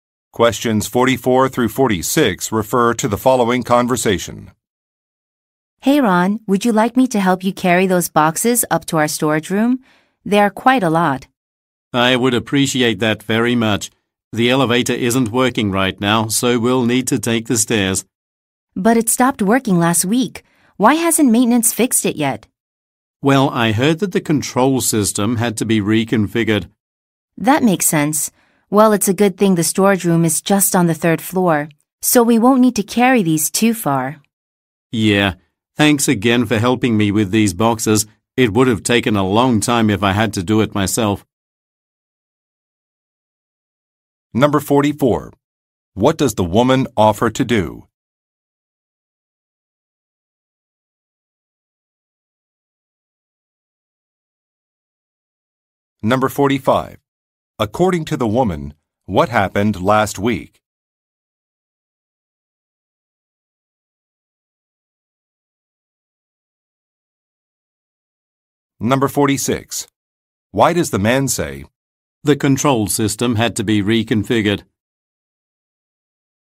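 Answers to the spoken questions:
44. Help carry boxes up to the storage room
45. The elevator stopped working
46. To explain why the elevator hasn't been fixed yet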